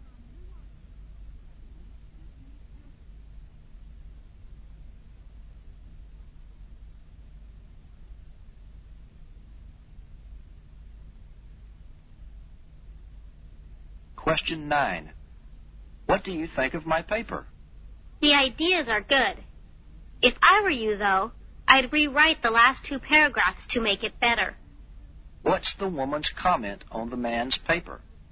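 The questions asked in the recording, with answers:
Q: What's the woman's comment on the man's paper?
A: The ideas are good but the last two paragraphs should be rewritten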